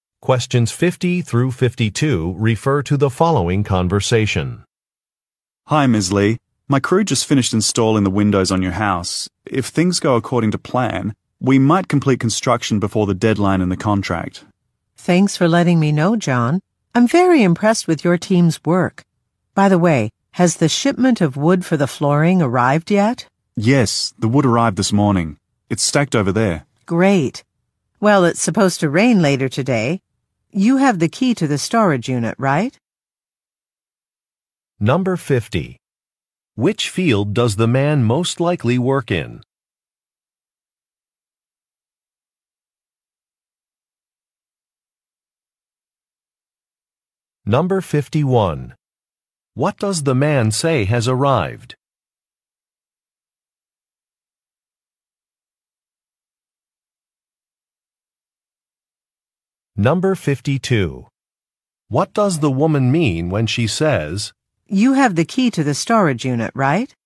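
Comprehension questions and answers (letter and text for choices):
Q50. Which field does the man most likely work in?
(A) Engineering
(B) Transportation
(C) Manufacturing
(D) Construction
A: (D) Construction

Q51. What does the man say has arrived?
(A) A design sketch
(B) A contract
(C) A shipment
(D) Some cleaning products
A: (C) A shipment

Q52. What does the woman mean when she says, "You have the key to the storage unit, right"?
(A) She wants a door to remain locked.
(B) She wants to inspect a facility.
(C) She wants the man to put some supplies away.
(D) She wants to confirm that only one key exists.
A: (C) She wants the man to put some supplies away.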